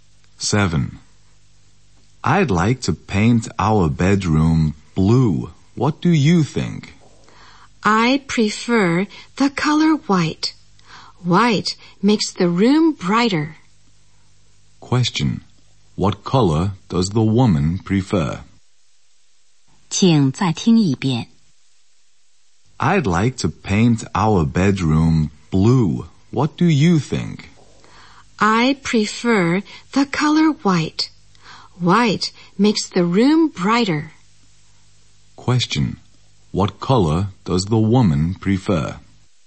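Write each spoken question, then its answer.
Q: What color does the woman prefer?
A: White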